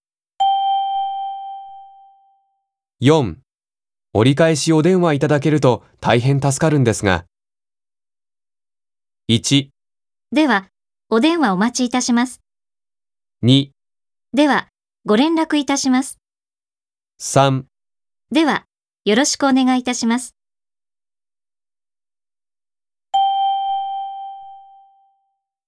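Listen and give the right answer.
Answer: 2: では、ご連絡いたします。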